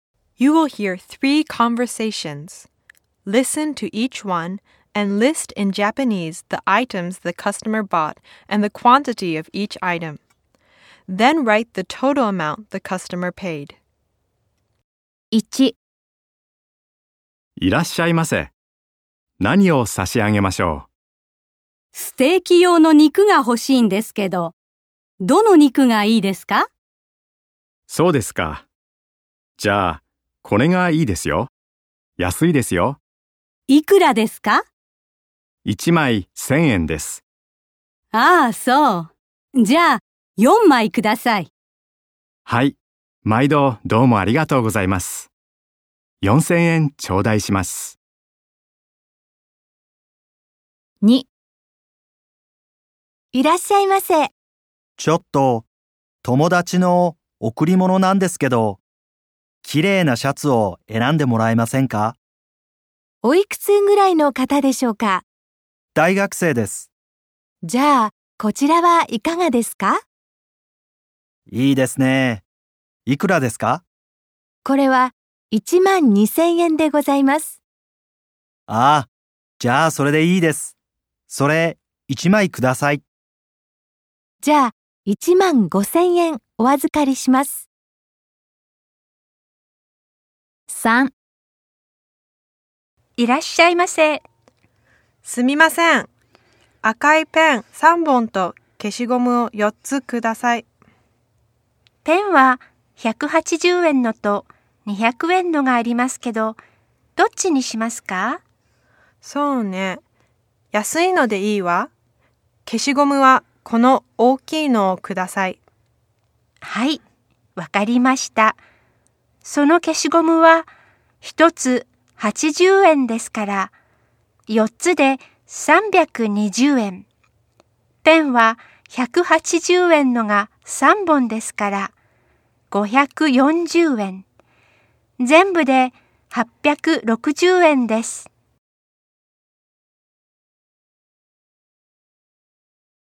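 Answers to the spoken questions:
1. ステーキ用の肉4枚、4000円
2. シャツ1枚、1万2000円
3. 赤いペン3本、消しゴム4つ、860円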